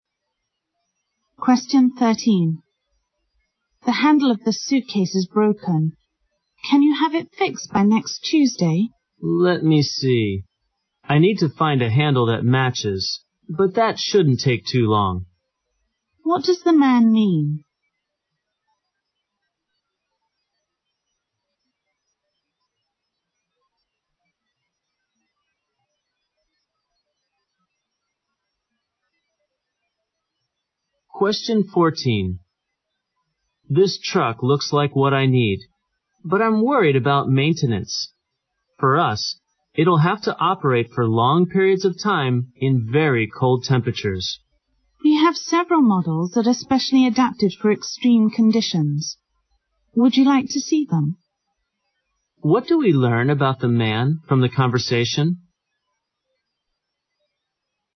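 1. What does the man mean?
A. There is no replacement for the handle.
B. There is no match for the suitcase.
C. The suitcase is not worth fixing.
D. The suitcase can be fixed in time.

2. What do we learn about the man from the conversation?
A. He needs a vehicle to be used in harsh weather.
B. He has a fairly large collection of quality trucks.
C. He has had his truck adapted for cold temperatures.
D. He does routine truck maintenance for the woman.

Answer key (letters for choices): 1D, 2A

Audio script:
W: The handle of the suitcase is broken. Can you have it fixed by next Tuesday?
M: Let me see, I need to find a handle that matches but that shouldn't take too long.
Q: What does the man mean?
M: This truck looks like what I need but I'm worried about maintenance. For us it'll have to operate for long periods of time in very cold temperatures.
W: We have several models that are especially adaptive for extreme conditions. 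Would you like to see them?
Q: What do we learn about the man from the conversation?

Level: 六级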